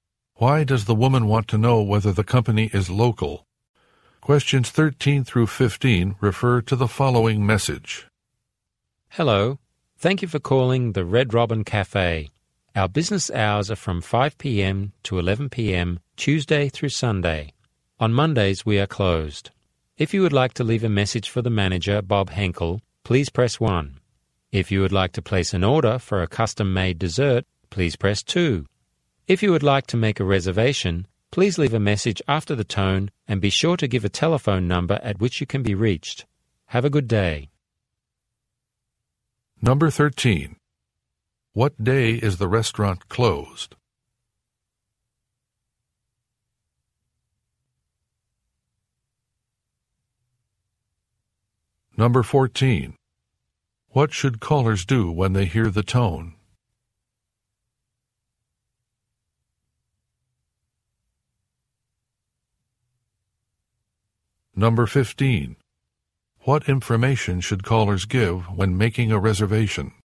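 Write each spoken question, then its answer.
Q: What day is the restaurant closed?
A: Monday

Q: What should callers do when they hear the tone?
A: Leave a message to make a reservation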